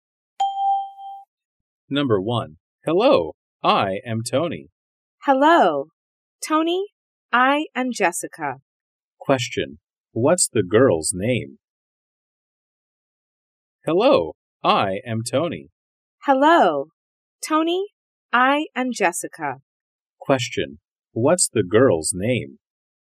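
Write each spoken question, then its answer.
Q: What's the girl's name?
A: Jessica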